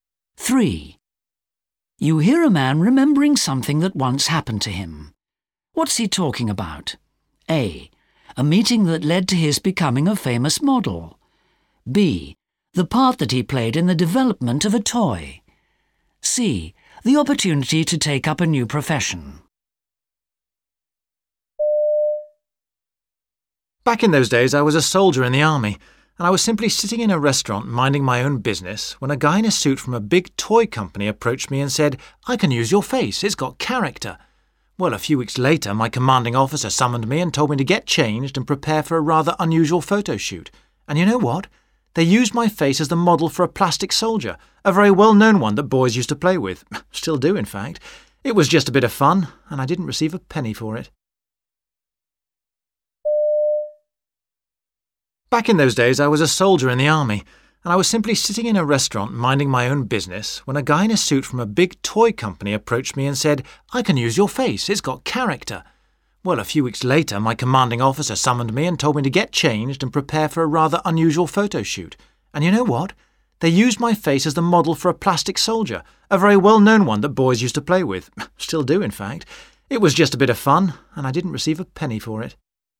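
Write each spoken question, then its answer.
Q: What's he talking about?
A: B: The part that he played in the development of a toy.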